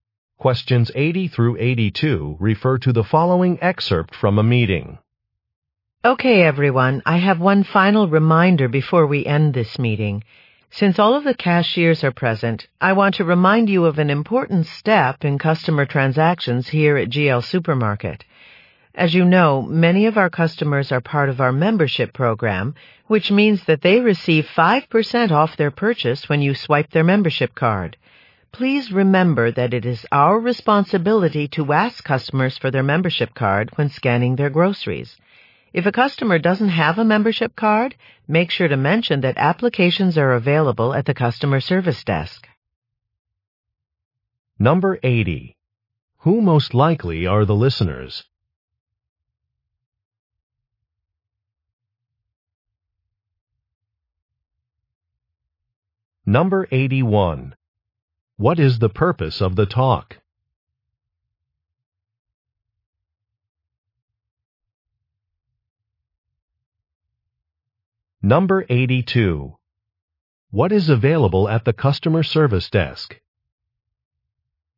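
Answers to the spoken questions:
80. Supermarket cashiers
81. To remind staff to ask customers for their membership card
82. Membership applications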